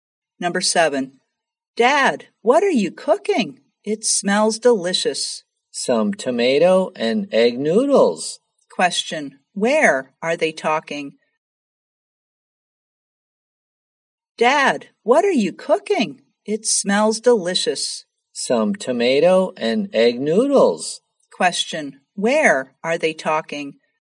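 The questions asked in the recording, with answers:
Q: where are they talking?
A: In the kitchen.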